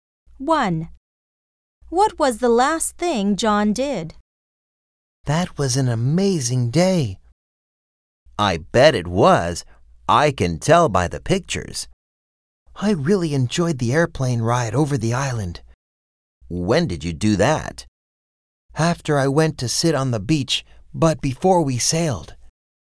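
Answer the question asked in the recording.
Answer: He went sailing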